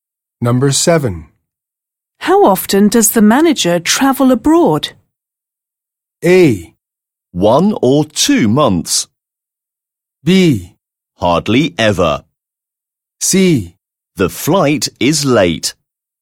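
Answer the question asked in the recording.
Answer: B: Hardly ever.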